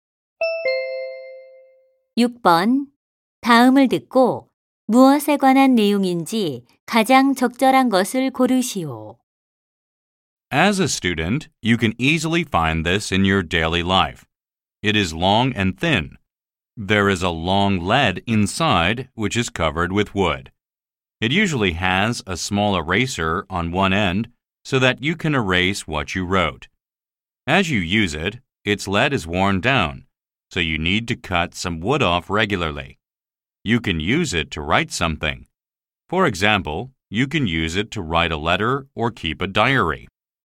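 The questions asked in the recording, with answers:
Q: 다음을 듣고 무엇에 관한 내용인지 가장 적절한 것을 고르시오.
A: 연필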